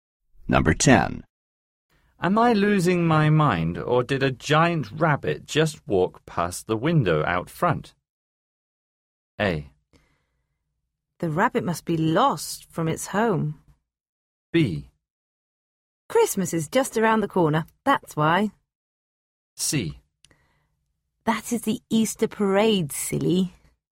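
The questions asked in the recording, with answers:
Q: Am I losing my mind, or did a giant rabbit just walk past the window out front?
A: C: That is the Easter parade, silly.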